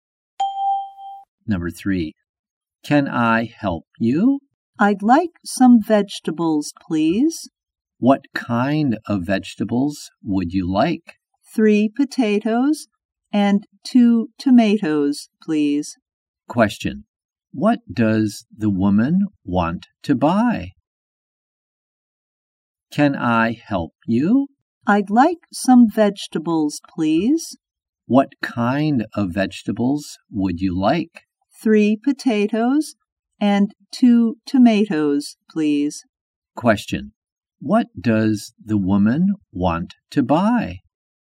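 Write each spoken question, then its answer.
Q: What does the woman want to buy?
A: 3 potatoes and 2 tomatoes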